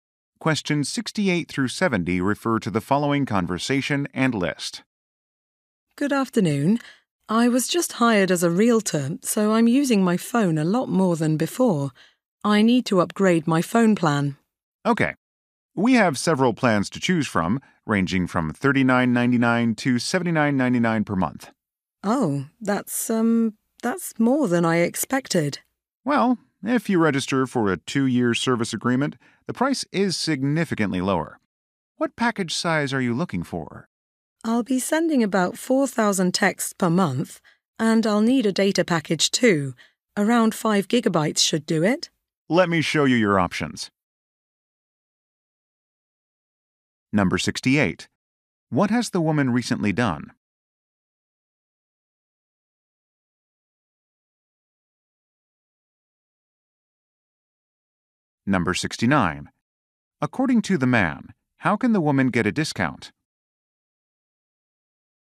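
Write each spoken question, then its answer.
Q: What has the woman recently done?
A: Started a new job as a realtor

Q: According to the man, how can the woman get a discount?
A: By signing a 2-year service agreement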